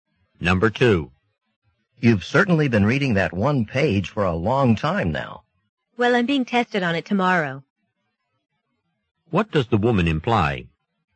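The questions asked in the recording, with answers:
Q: What does the woman imply?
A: She is studying the page carefully for tomorrow's test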